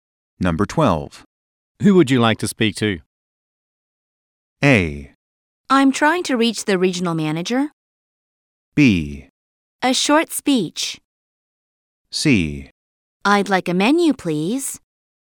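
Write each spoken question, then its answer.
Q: Who would you like to speak to?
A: A: I'm trying to reach the regional manager.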